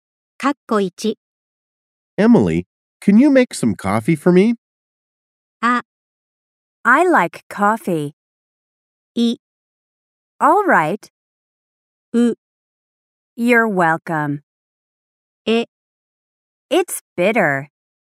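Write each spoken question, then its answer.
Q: Emily, can you make some coffee for me?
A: い: All right.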